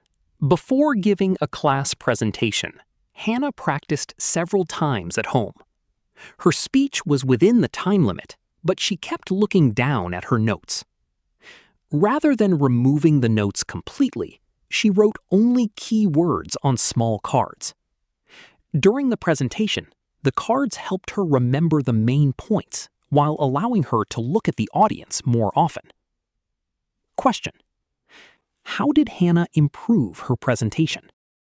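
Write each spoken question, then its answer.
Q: how did Hannah improve her presentation?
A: She wrote only key words on small cards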